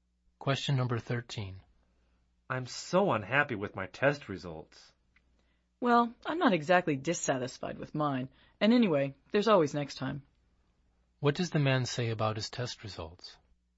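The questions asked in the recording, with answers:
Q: What does the man say about his test results?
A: He is fairly satisfied with them.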